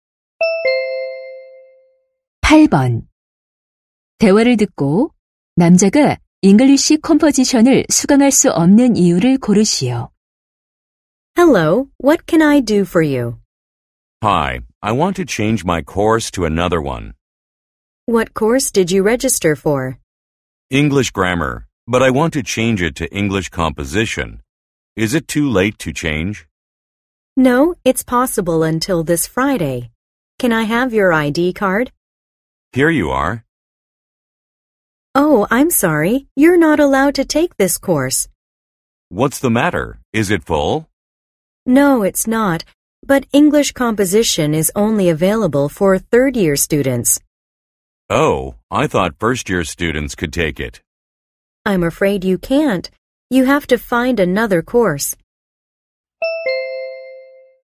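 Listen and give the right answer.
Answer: 3학년만 수강할 수 있어서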